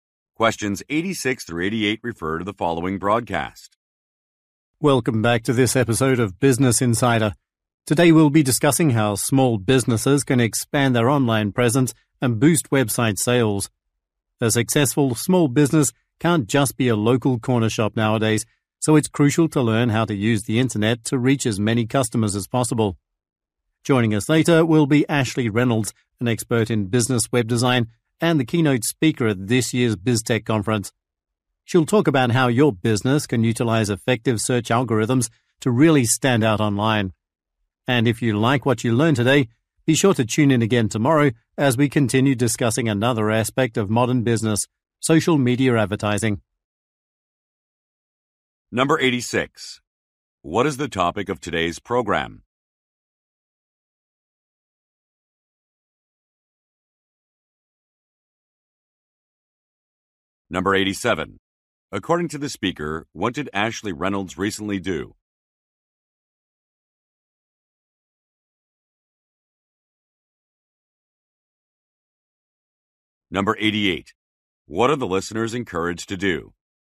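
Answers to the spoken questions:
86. Expanding small businesses' online presence and website sales
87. Gave the keynote speech at the BizTech conference
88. Tune in again tomorrow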